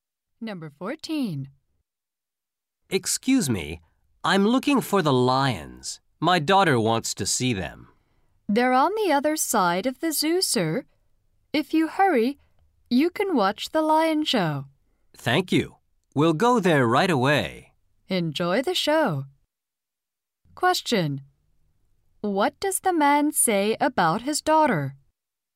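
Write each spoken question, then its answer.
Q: What does the man say about his daughter?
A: She wants to see the lions.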